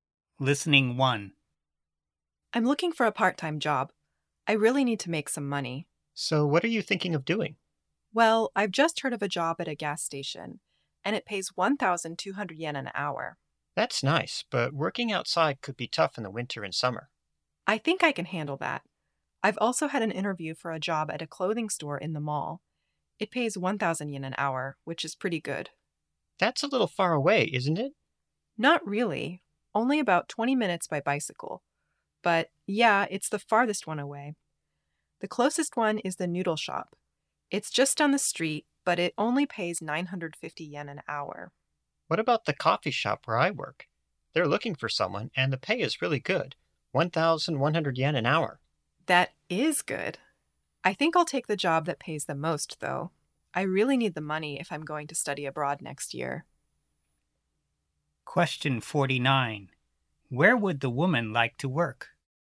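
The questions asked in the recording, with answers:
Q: Where would the woman like to work?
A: At the gas station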